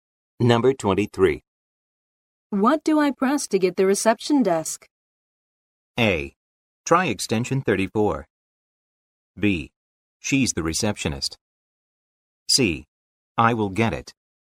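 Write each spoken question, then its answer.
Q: What do I press to get the reception desk?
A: A: Try extension 34.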